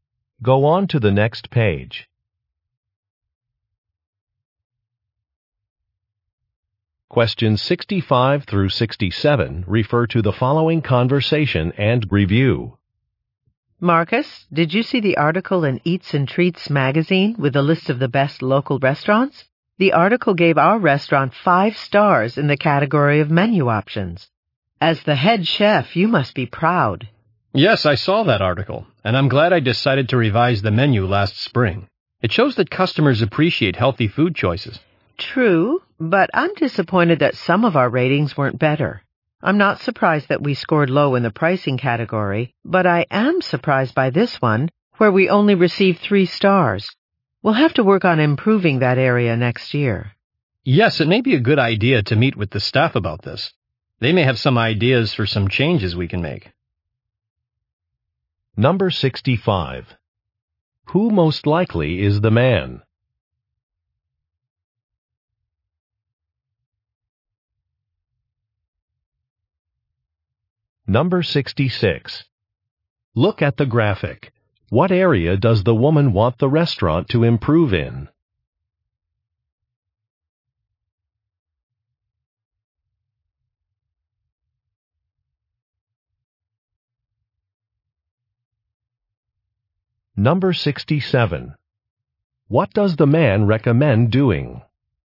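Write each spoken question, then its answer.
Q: Who most likely is the man?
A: A head chef

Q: What does the man recommend doing?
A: Meeting with the staff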